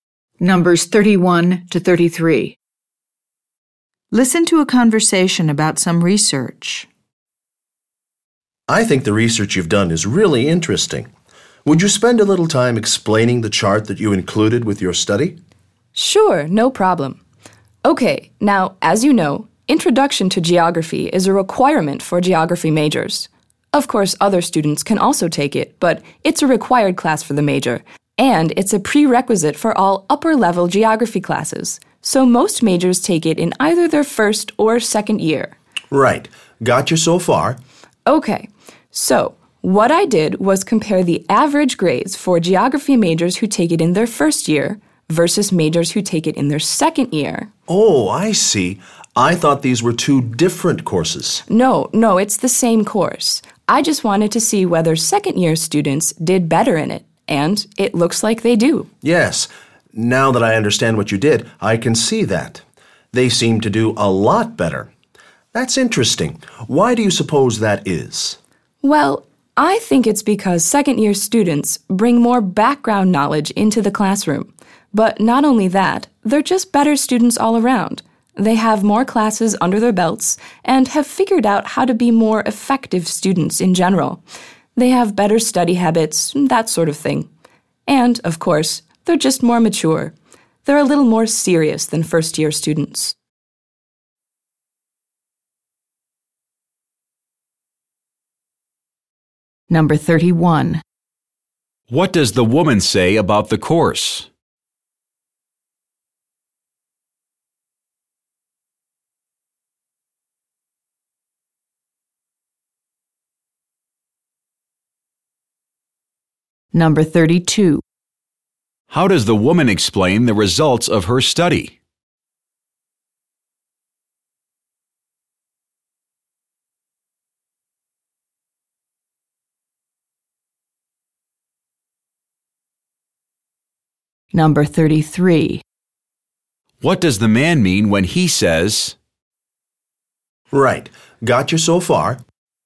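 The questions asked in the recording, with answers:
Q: What does the woman say about the course?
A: It is required for geography majors and a prerequisite for upper-level classes

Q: How does the woman explain the results of her study?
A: Second-year students have more background knowledge, better study habits and are more mature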